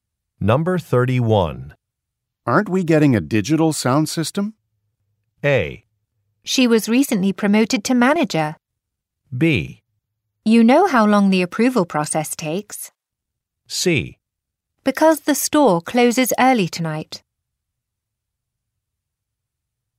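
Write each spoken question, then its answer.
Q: Aren't we getting a digital sound system?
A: B: You know how long the approval process takes.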